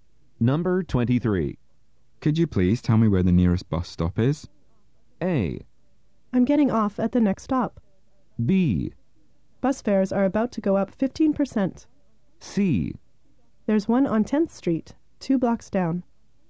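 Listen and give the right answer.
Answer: C: There's one on 10th Street, 2 blocks down.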